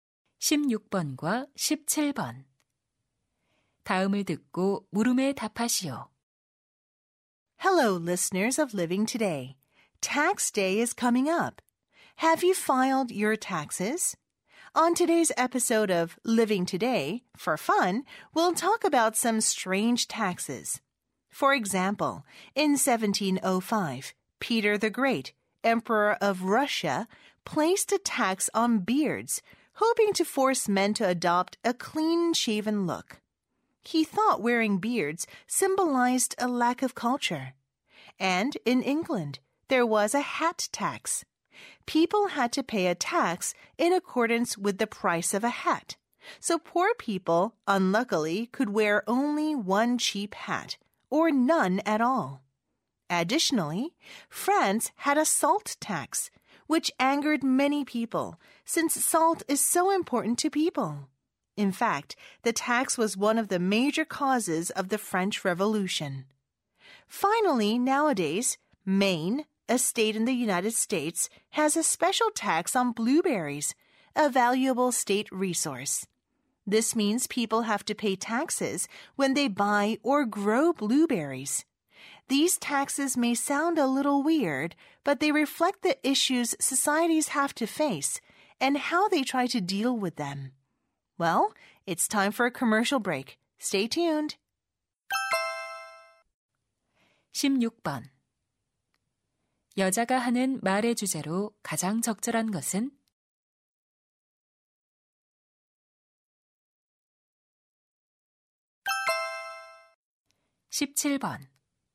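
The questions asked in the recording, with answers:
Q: 여자가 하는 말의 주제로 가장 적절한 것은?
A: 역사 속 특이한 세금들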